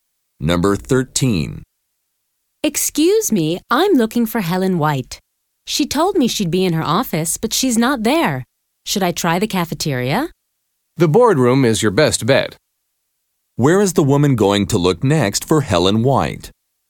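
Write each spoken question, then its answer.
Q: Where is the woman going to look next for Helen White?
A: The boardroom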